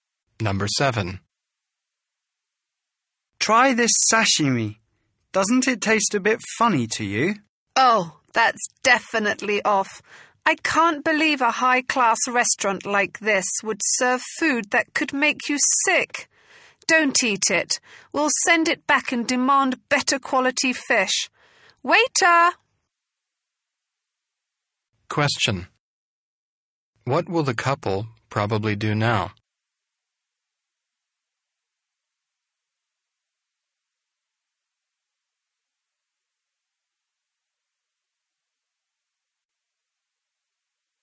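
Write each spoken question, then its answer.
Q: What will the couple probably do now?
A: Send the sashimi back and demand better fish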